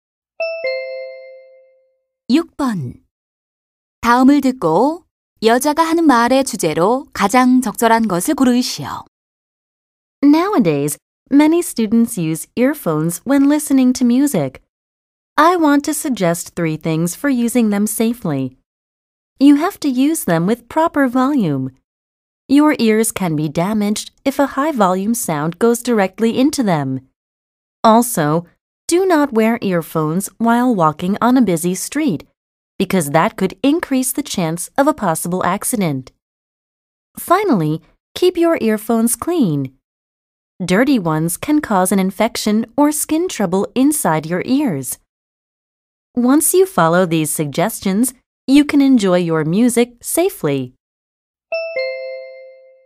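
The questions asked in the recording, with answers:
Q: 다음을 듣고 여자가 하는 말의 주제로 가장 적절한 것을 고르시오.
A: 이어폰을 안전하게 사용하는 방법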